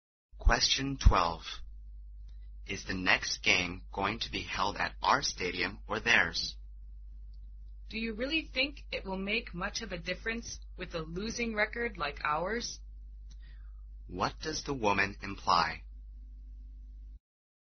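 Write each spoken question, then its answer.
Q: What does the woman imply?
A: It doesn't matter where they play; their team will probably lose anyway.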